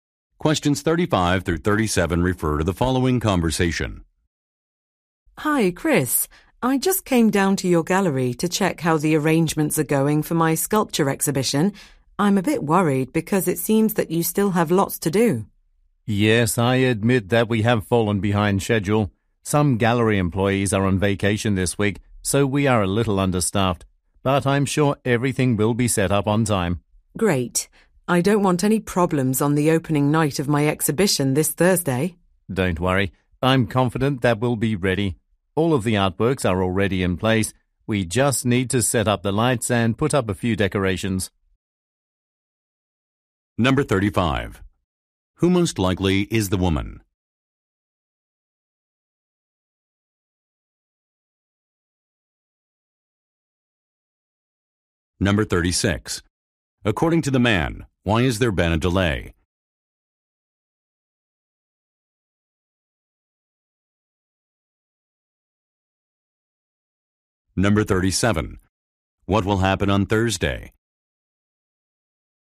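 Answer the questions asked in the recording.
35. A sculptor
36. Some employees are on vacation
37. The exhibition will open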